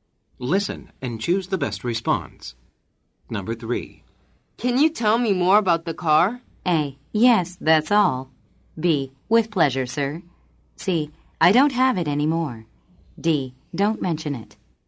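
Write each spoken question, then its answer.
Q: Can you tell me more about the car?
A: B: With pleasure, sir.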